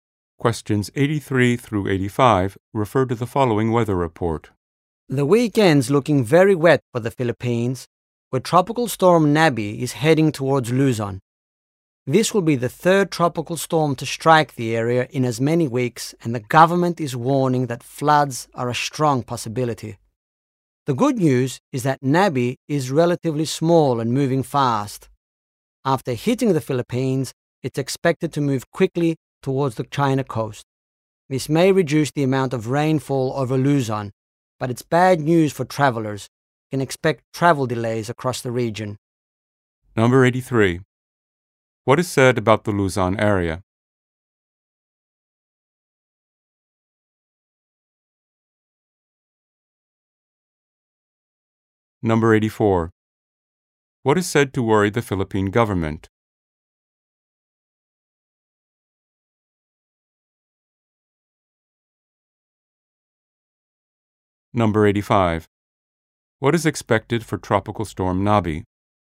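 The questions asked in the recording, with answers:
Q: What is said to worry the Philippine government?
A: Possible floods

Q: What is expected for Tropical Storm Nabi?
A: It will move quickly toward the China coast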